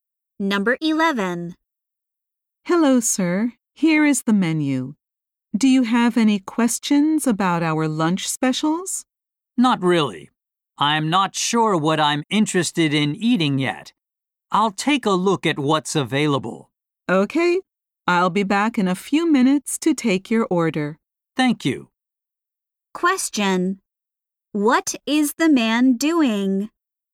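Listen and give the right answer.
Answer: Looking at the menu to decide what to eat.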